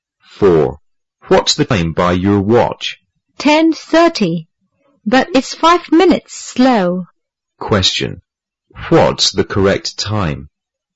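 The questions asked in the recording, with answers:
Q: Question. What's the correct time?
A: 10:35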